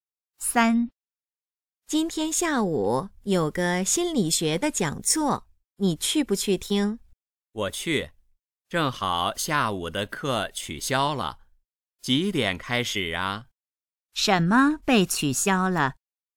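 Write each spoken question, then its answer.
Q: 什么被取消了?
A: 下午的课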